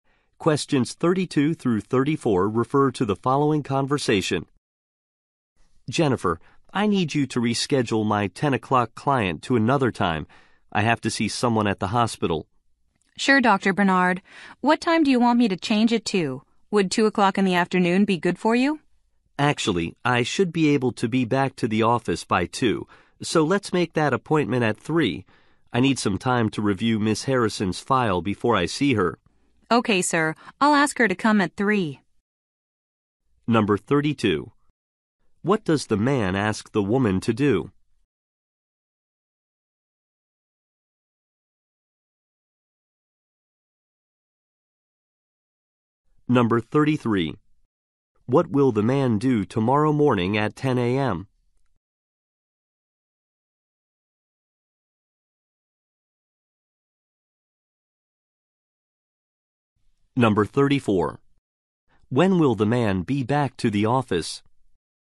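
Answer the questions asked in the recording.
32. Reschedule his 10 o'clock client appointment
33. See someone at the hospital
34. By 2 o'clock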